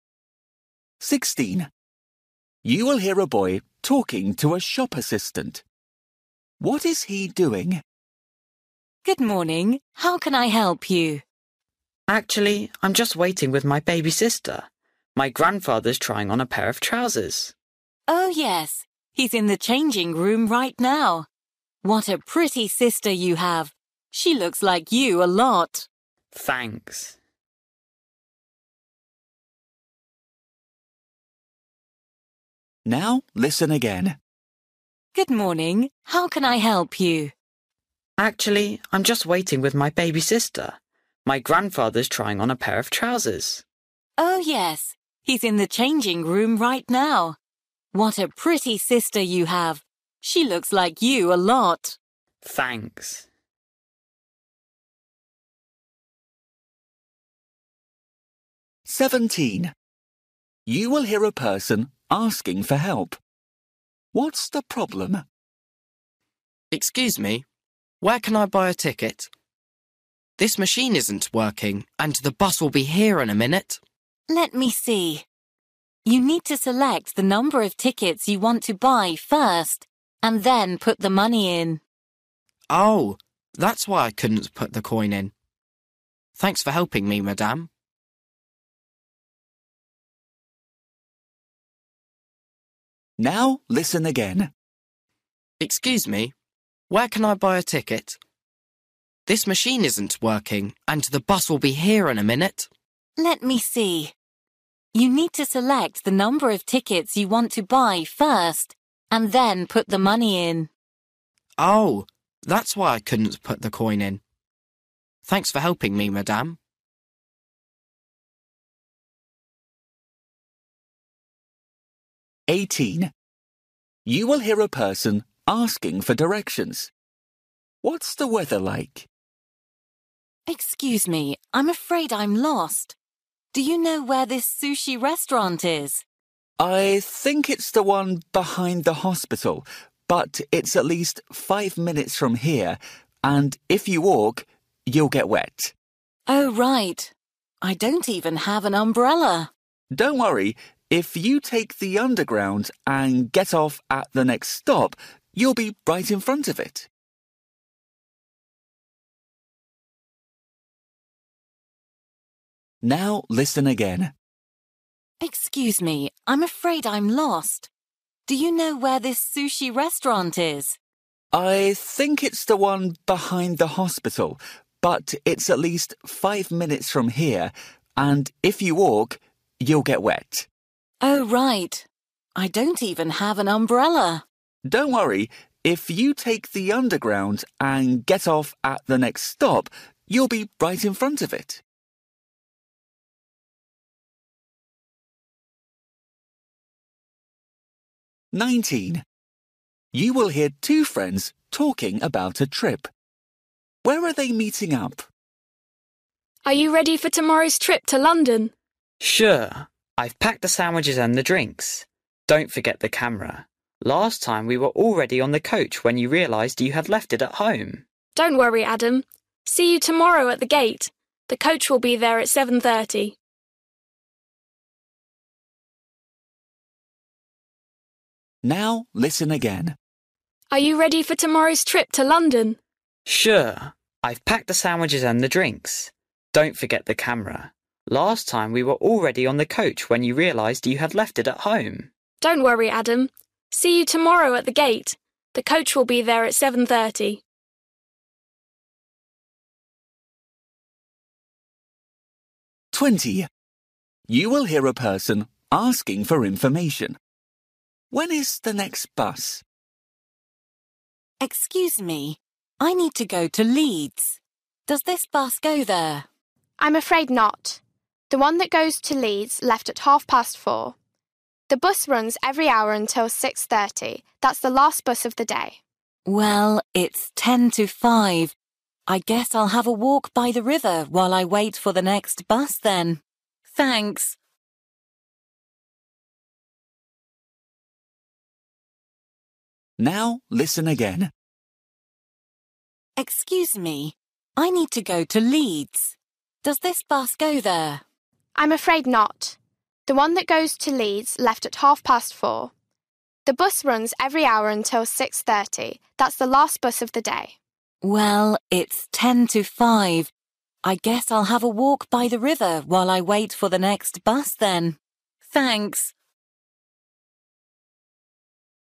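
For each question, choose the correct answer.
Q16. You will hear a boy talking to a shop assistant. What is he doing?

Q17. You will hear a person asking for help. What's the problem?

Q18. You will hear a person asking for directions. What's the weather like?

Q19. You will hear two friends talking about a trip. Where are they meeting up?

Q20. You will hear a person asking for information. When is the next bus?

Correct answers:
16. Waiting with his baby sister
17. She can't use the ticket machine
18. It's raining
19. At the gate
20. 5:30

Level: Luyện nghe trình độ A2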